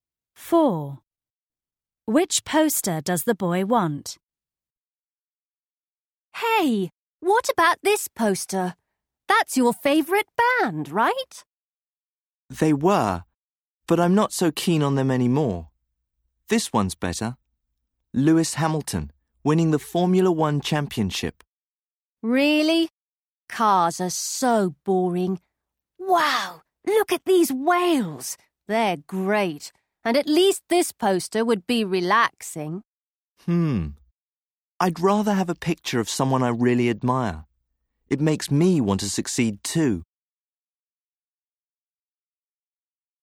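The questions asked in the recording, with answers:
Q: Which poster does the boy want?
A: The Lewis Hamilton poster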